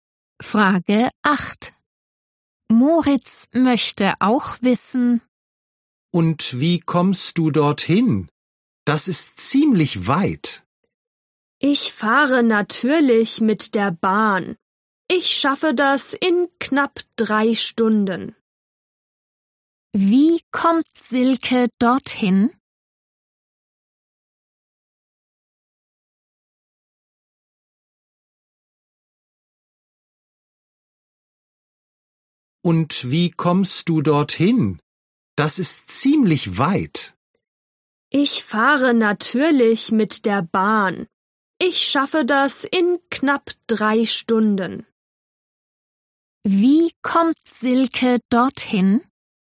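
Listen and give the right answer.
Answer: Mit der Bahn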